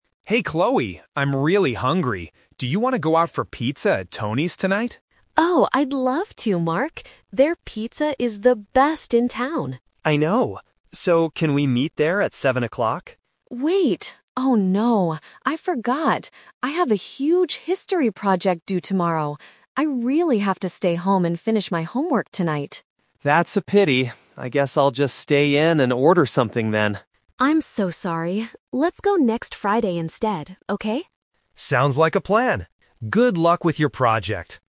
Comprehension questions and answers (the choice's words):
Listen to the conversation and choose the correct answer (A, B, or C).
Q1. What does Mark want to do tonight?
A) Stay home and study.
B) Eat pizza with Chloe.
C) Help Chloe with her history project.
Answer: Eat pizza with Chloe.

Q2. Why does Chloe refuse the invitation?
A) She doesn't like Tony's pizza.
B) She is too tired to go out.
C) She needs to complete her school work.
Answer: She needs to complete her school work.

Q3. When are they going to meet?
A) Tonight at seven o'clock.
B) Tomorrow morning.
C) Next Friday.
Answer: Next Friday.

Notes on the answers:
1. Mark clearly asks: "Do you want to go out for pizza... tonight?". Option A is what Chloe has to do, and Option C is not mentioned.
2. Chloe says: "I have a huge history project... I really have to stay home and finish my homework." Option A is a Trap because she actually says the pizza is "the best". Option B is not mentioned.
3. After refusing for tonight, Chloe suggests: "Let's go next Friday instead," and Mark agrees. Option A is the Trap (the original plan that was changed). Option B is not mentioned.

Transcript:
Mark: Hey Chloe, I'm really hungry. Do you want to go out for pizza at Tony's tonight?
Chloe: Oh, I'd love to, Mark! Their pizza is the best in town.
Mark: I know! So, can we meet there at seven o'clock?
Chloe: Wait... oh no, I forgot. I have a huge history project due tomorrow. I really have to stay home and finish my homework tonight.
Mark: That's a pity. I guess I'll just stay in and order something then.
Chloe: I'm so sorry. Let's go next Friday instead, okay?